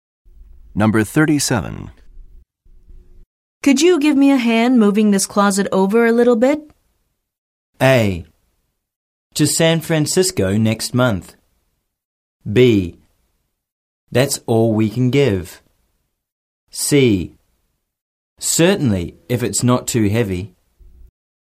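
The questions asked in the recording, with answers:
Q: Could you give me a hand moving this closet over a little bit?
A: C: Certainly, if it's not too heavy.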